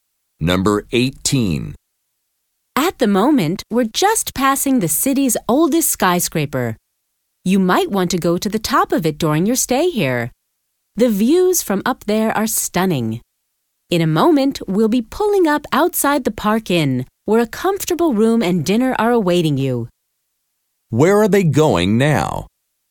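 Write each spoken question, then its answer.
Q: Where are they going now?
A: To the Park Inn hotel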